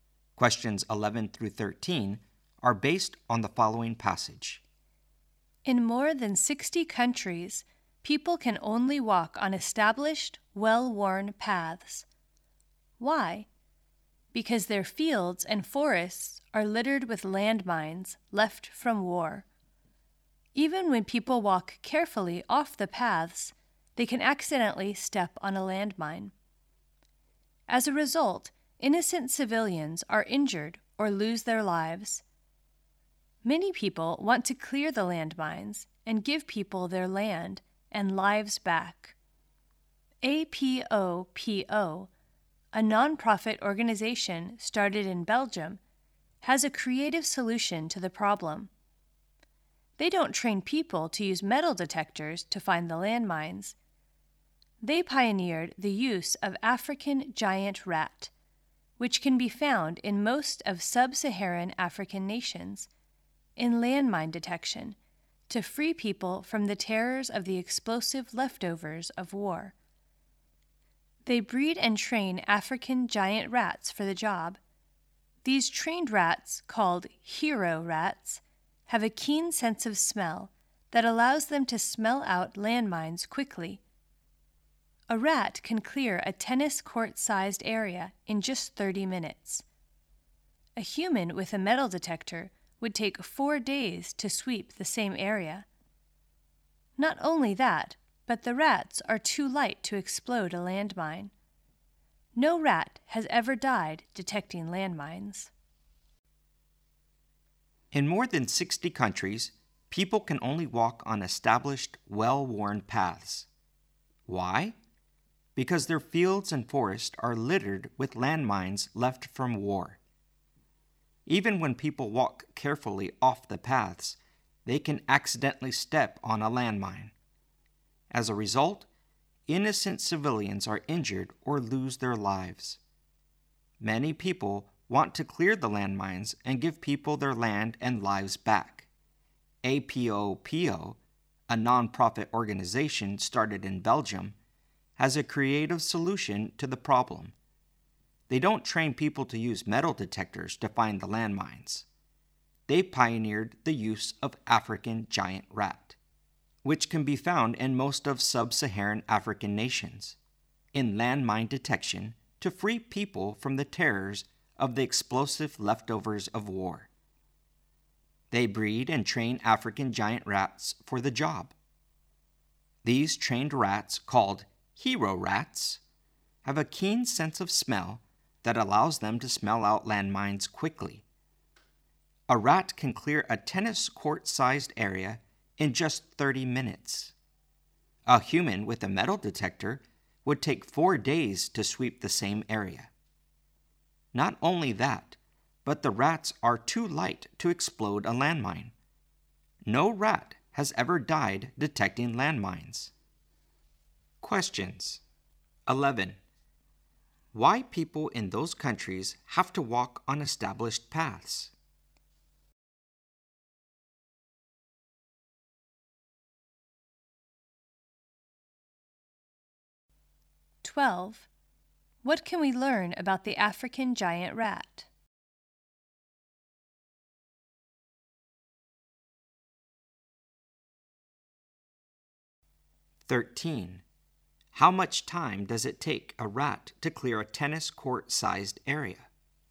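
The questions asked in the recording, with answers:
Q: Why people in those countries have to walk on established paths?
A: Their fields and forests are littered with landmines left from war

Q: How much time does it take a rat to clear a tennis court-sized area?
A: 30 minutes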